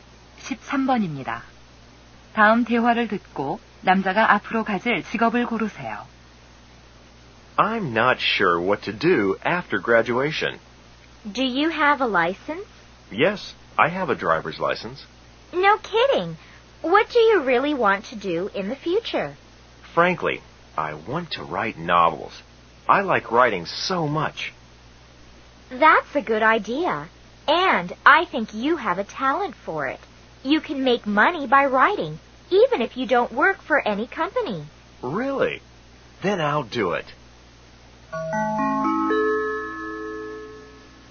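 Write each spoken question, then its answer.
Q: 다음 대화를 듣고 남자가 앞으로 가질 직업을 고르세요.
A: 소설가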